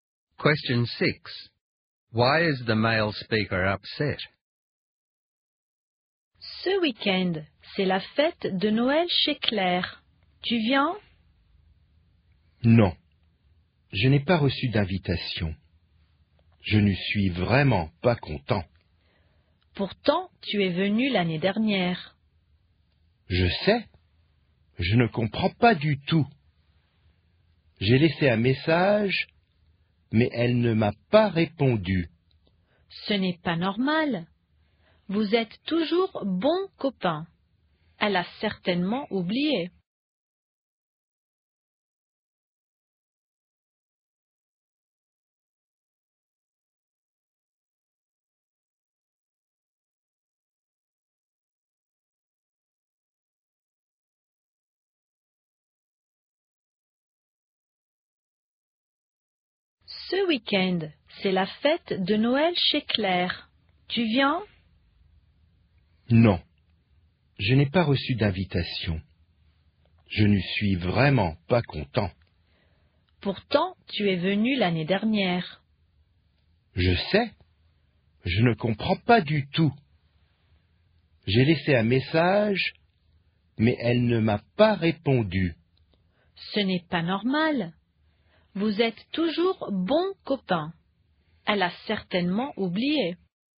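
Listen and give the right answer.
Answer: He did not receive an invitation to Claire's Christmas party, and she didn't answer his message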